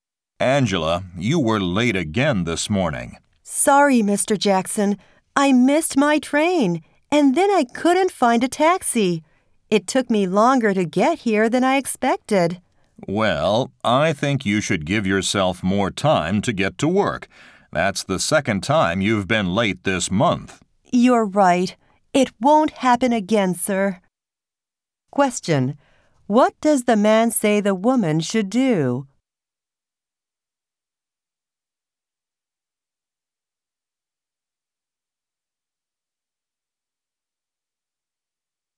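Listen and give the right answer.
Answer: Give herself more time to get to work.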